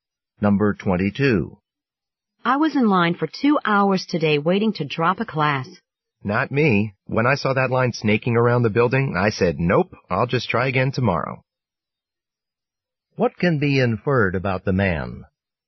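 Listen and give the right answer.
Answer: He hasn't dropped the class yet; he'll try again tomorrow.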